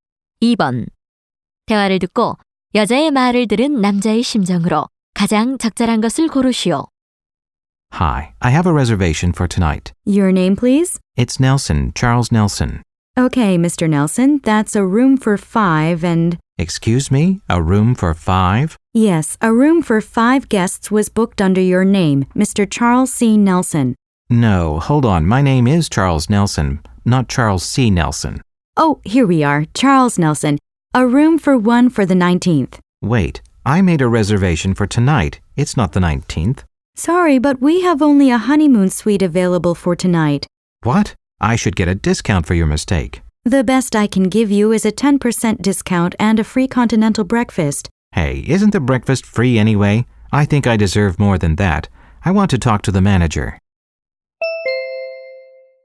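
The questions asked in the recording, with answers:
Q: 대화를 듣고 여자의 말을 들은 남자의 심정으로 가장 적절한 것을 고르시오.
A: 화가 남 (불만스러움)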